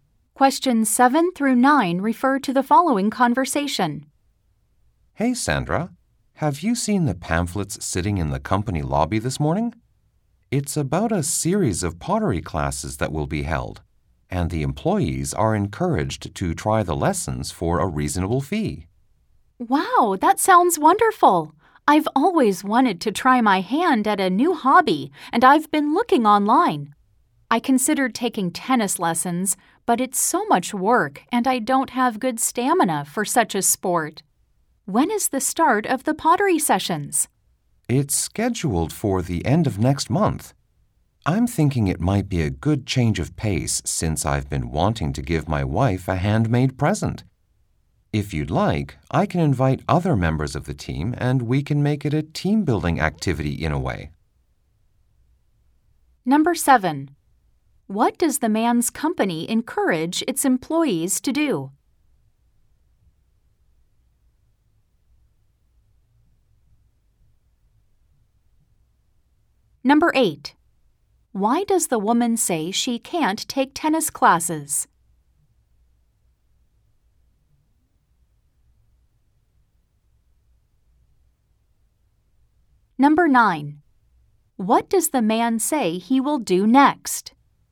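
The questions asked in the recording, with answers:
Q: What does the man's company encourage its employees to do?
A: Take pottery classes

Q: Why does the woman say she can't take tennis classes?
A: She doesn't have good stamina for it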